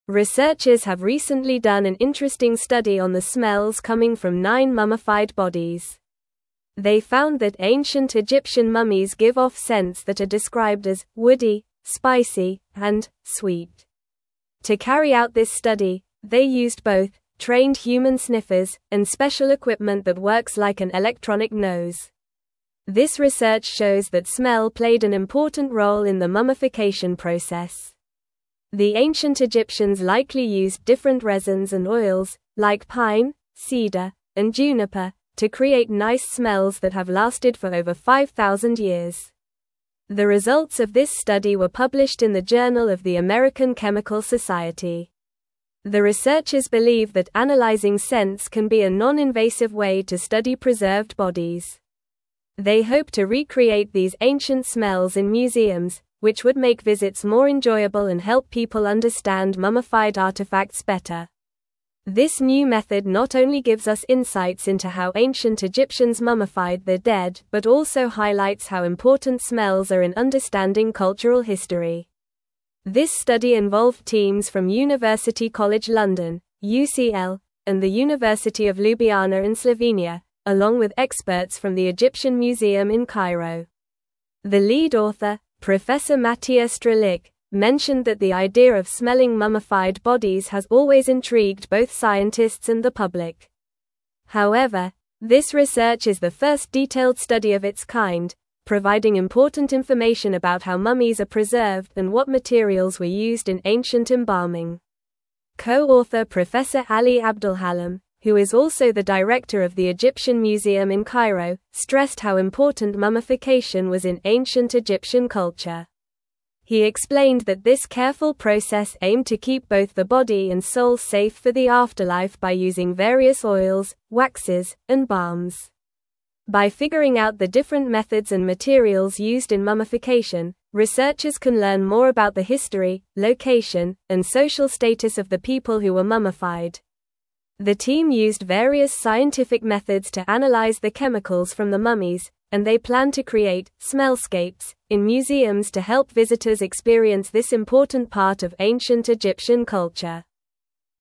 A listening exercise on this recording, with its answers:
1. Researchers have recently done an interesting study on the smells (1)______ from nine mummified bodies.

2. They found that ancient Egyptian mummies give off (2)______ that are described as "woody," "spicy," and "sweet."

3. This research (3)______ that smell played an important role in the mummification (4)______.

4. This research (3)______ that smell played an important role in the mummification (4)______.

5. They hope to recreate these ancient (5)______ in (6)______, which would make visits more enjoyable and help (7)______ understand mummified artifacts better.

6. They hope to recreate these ancient (5)______ in (6)______, which would make visits more enjoyable and help (7)______ understand mummified artifacts better.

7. They hope to recreate these ancient (5)______ in (6)______, which would make visits more enjoyable and help (7)______ understand mummified artifacts better.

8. This new method not only gives us insights into how ancient Egyptians mummified their dead but also highlights how important smells are in understanding (8)______ history.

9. The lead author, (9)______ Matija Strlic, mentioned that the idea of smelling mummified bodies has always intrigued both scientists and the (10)______.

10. The lead author, (9)______ Matija Strlic, mentioned that the idea of smelling mummified bodies has always intrigued both scientists and the (10)______.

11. However, this research is the first detailed study of its kind, providing important information about how mummies are preserved and what materials were used in ancient (11)______.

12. Co-author Professor Ali Abdelhalim, who is also the (12)______ of the Egyptian Museum in Cairo, stressed how important mummification was in ancient Egyptian culture.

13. He explained that this careful process aimed to keep both the body and soul safe for the afterlife by using various oils, (13)______, and balms.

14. By (14)______ out the different methods and materials used in mummification, researchers can learn more about the history, location, and social status of the people who were mummified.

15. The team used various scientific methods to (15)______ the chemicals from the mummies, and they plan to create "smellscapes" in museums to help visitors (16)______ this important part of ancient Egyptian culture.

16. The team used various scientific methods to (15)______ the chemicals from the mummies, and they plan to create "smellscapes" in museums to help visitors (16)______ this important part of ancient Egyptian culture.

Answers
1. coming
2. scents
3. shows
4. process
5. smells
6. museums
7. people
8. cultural
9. Professor
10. public
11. embalming
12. director
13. waxes
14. figuring
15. analyze
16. experience

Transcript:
Researchers have recently done an interesting study on the smells coming from nine mummified bodies. They found that ancient Egyptian mummies give off scents that are described as "woody," "spicy," and "sweet." To carry out this study, they used both "trained human sniffers" and special equipment that works like an electronic nose. This research shows that smell played an important role in the mummification process. The ancient Egyptians likely used different resins and oils, like pine, cedar, and juniper, to create nice smells that have lasted for over 5,000 years.
The results of this study were published in the Journal of the American Chemical Society. The researchers believe that analyzing scents can be a non-invasive way to study preserved bodies. They hope to recreate these ancient smells in museums, which would make visits more enjoyable and help people understand mummified artifacts better. This new method not only gives us insights into how ancient Egyptians mummified their dead but also highlights how important smells are in understanding cultural history.
This study involved teams from University College London (UCL) and the University of Ljubljana in Slovenia, along with experts from the Egyptian Museum in Cairo. The lead author, Professor Matija Strlic, mentioned that the idea of smelling mummified bodies has always intrigued both scientists and the public. However, this research is the first detailed study of its kind, providing important information about how mummies are preserved and what materials were used in ancient embalming.
Co-author Professor Ali Abdelhalim, who is also the director of the Egyptian Museum in Cairo, stressed how important mummification was in ancient Egyptian culture. He explained that this careful process aimed to keep both the body and soul safe for the afterlife by using various oils, waxes, and balms. By figuring out the different methods and materials used in mummification, researchers can learn more about the history, location, and social status of the people who were mummified. The team used various scientific methods to analyze the chemicals from the mummies, and they plan to create "smellscapes" in museums to help visitors experience this important part of ancient Egyptian culture.

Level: Level 3